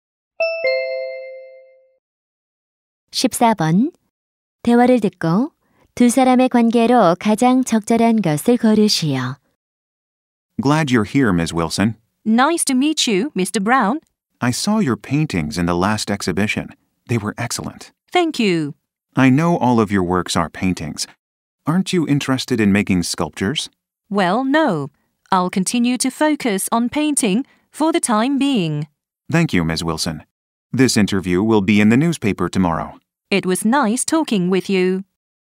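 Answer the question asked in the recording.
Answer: 기자 - 화가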